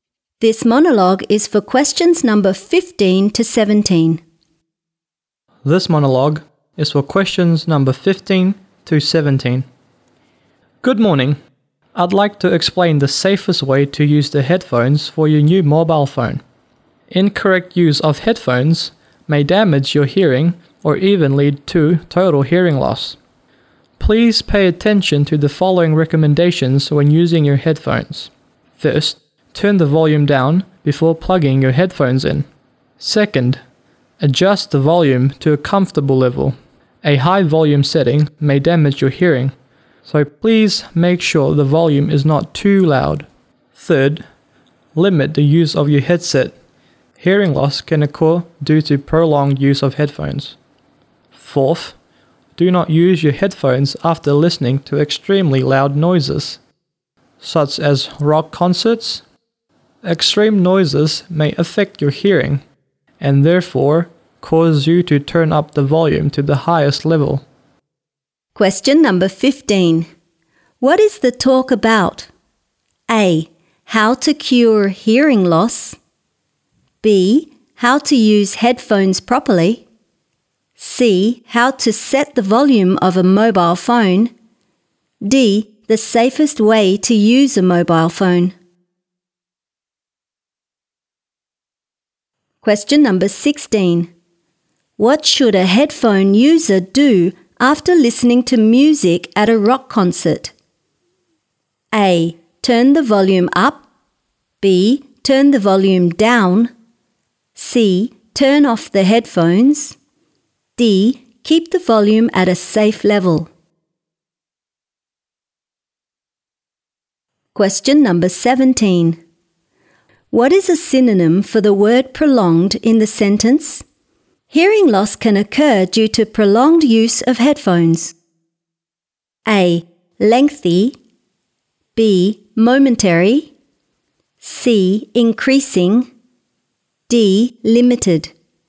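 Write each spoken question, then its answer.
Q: What is the talk about?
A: B: How to use headphones properly.

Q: What is a synonym for the word prolonged in the sentence?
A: A: Lengthy.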